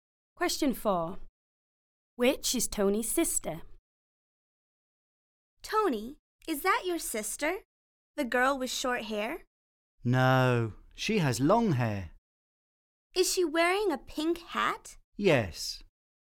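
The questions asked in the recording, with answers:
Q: Which is Tony's sister?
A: The girl with long hair and a pink hat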